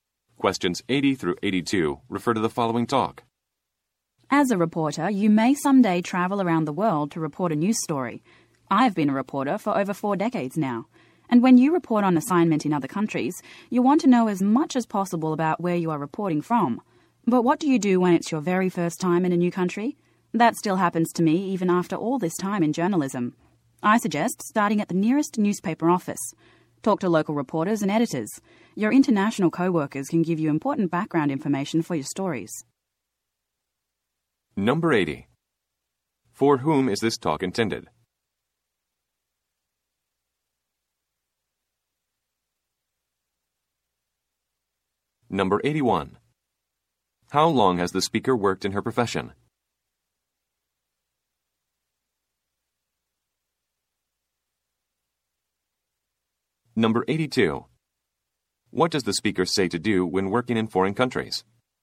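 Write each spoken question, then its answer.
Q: For whom is this talk intended?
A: Reporters

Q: How long has the speaker worked in her profession?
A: Over 4 decades

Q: What does the speaker say to do when working in foreign countries?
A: Start at the nearest newspaper office and talk to local reporters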